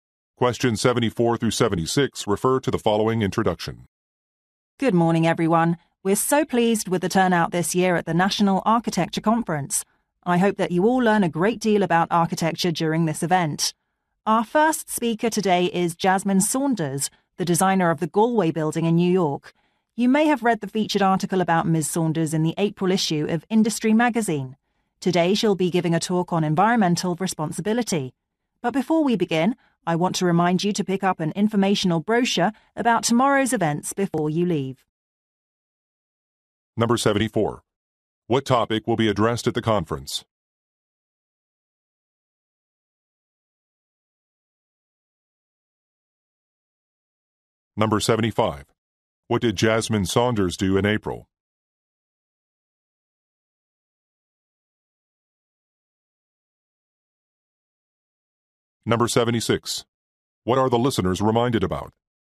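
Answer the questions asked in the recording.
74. Architecture
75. She was featured in an article in Industry Magazine
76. To pick up a brochure about tomorrow's events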